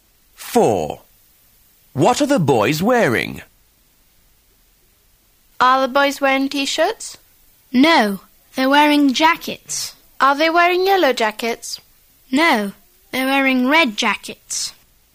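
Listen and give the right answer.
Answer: Red jackets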